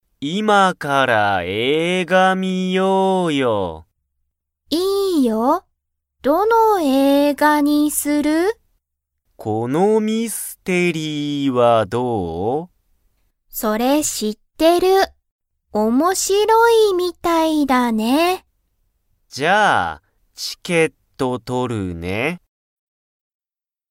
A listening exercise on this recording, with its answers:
Comprehension Quiz (Skip if you don't understand the conversation yet)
ケンは何なにをしますか?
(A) 仕事しごとをする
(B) チケットを取とる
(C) 家いえに帰かえる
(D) ご飯はんを食たべる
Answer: チケットを取とる

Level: Level 1

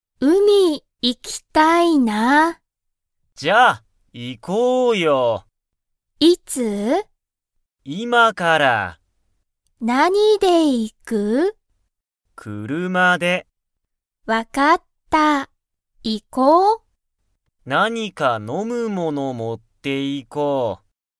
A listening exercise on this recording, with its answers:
アキとハルトは、____海(うみ)に行(い)く。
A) 歩(ある)いて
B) 今(いま)から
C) 友達(ともだち)と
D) 飲(の)んだあと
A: 今(いま)から

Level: Level 1

